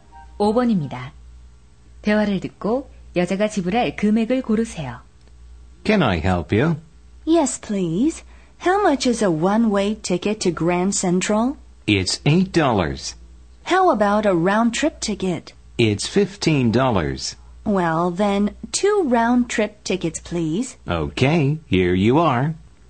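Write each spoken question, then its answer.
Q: 대화를 듣고 여자가 지불할 금액을 고르세요.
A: 30달러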